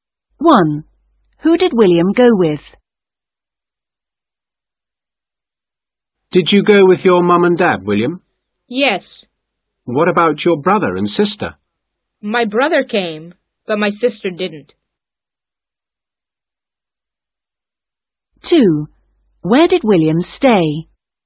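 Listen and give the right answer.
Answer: His mum, dad and brother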